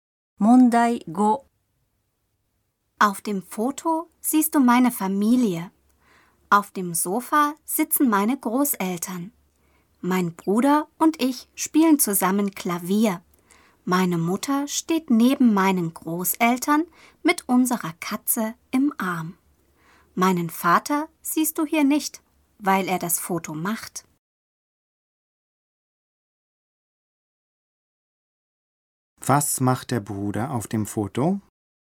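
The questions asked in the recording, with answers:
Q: Was macht der Bruder auf dem Foto?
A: Er spielt Klavier.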